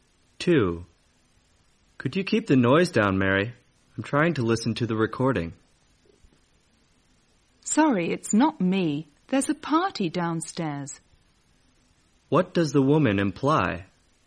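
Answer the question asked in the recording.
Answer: The noise is coming from a party downstairs, not from her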